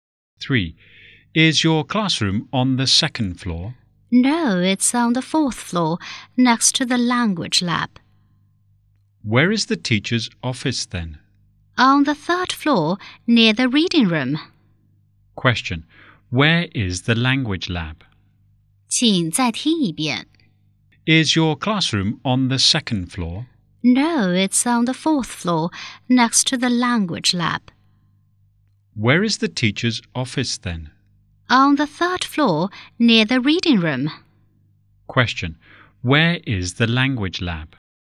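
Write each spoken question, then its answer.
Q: Question, where is the language lab?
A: On the fourth floor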